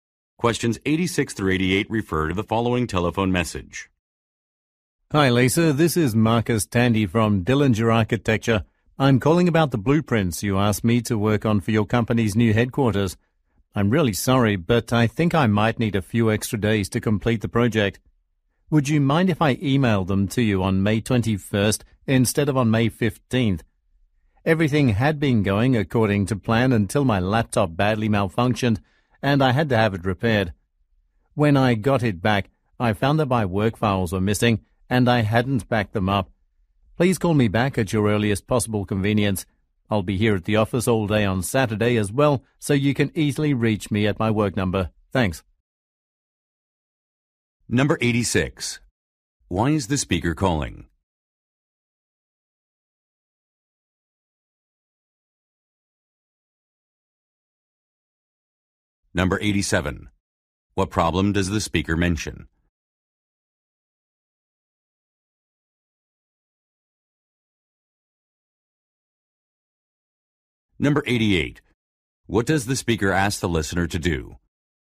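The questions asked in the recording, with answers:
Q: Why is the speaker calling?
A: To ask for more time to finish the blueprints

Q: What problem does the speaker mention?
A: His laptop malfunctioned and files were lost

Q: What does the speaker ask the listener to do?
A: Call him back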